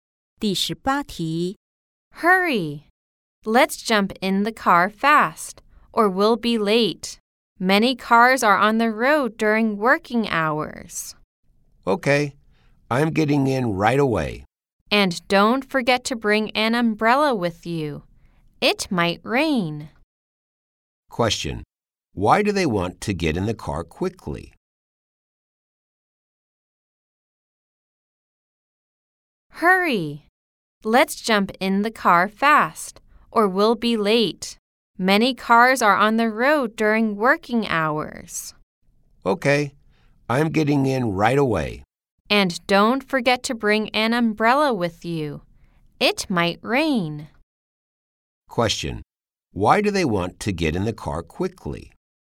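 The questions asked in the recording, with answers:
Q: Question: Why do they want to get in the car quickly?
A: Or they'll be late; many cars are on the road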